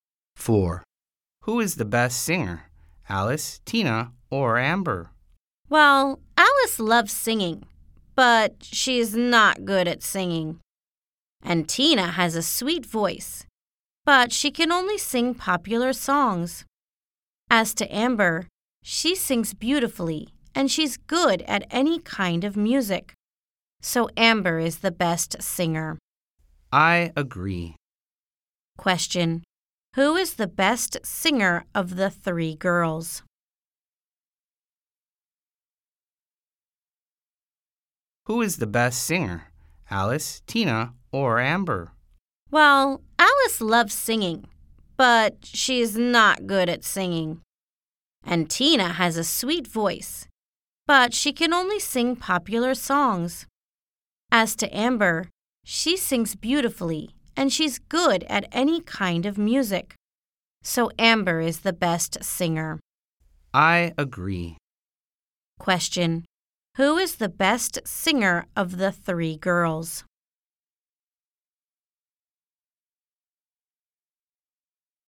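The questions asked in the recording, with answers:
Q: Who is the best singer of the three girls?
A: Amber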